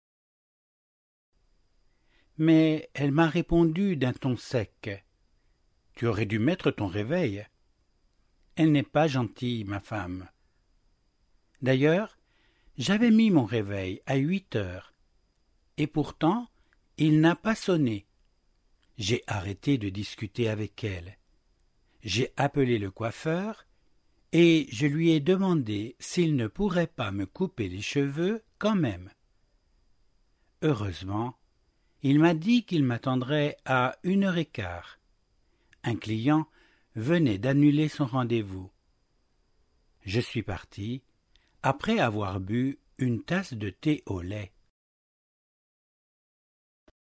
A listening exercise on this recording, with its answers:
話の内容に合致している場合は 1を 一致しない場合は 2を記入してください。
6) Alain a pensé que sa femme était méchante.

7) Alain avait mis son réveil bien à l'heure.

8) Au lieu de continuer à discuter avec sa femme, Alain a téléphoné au coiffeur.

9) Le coiffeur a dit à Alain qu'il pourrait le recevoir à 13 heures 15.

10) Alain est parti après avoir bu une tasse de lait.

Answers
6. 1
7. 1
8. 1
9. 1
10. 2

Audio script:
Mais elle m'a répondu d'un ton sec : « Tu aurais dû mettre ton réveil. » Elle n'est pas gentille, ma femme ! D'ailleurs j'avais mis mon réveil à huit heures. Et pourtant il n'a pas sonné. J'ai arrêté de discuter avec elle. J'ai appelé le coiffeur et je lui ai demandé s'il ne pourrait pas me couper les cheveux quand même. Heureusement il m'a dit qu'il m'attendrait à une heure et quart. Un client venait d'annuler son rendez-vous. Je suis parti après avoir bu une tasse de thé au lait.